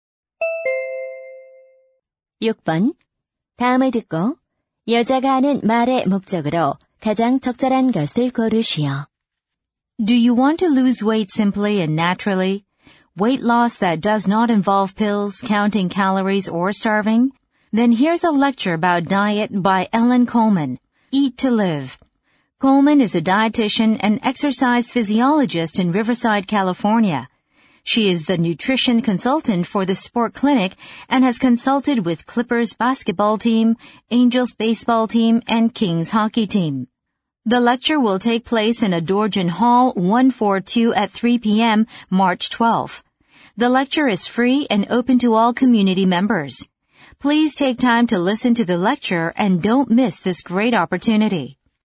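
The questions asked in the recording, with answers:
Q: 다음을 듣고 여자가 하는 말의 목적으로 가장 적절한 것을 고르시오.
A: 다이어트 강연 홍보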